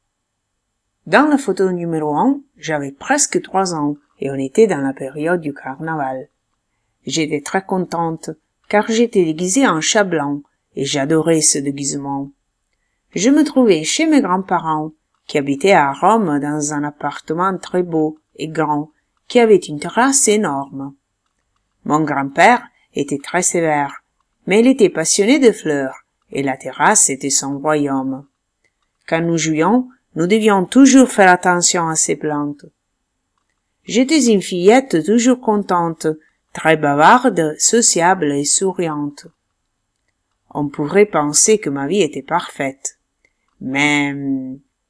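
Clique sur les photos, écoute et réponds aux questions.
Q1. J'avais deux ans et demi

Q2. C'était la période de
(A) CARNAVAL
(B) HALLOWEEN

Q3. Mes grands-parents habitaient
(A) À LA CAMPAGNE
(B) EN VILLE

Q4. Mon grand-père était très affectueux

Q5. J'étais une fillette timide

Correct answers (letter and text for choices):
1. FAUX
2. (A) CARNAVAL
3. (B) EN VILLE
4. FAUX
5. FAUX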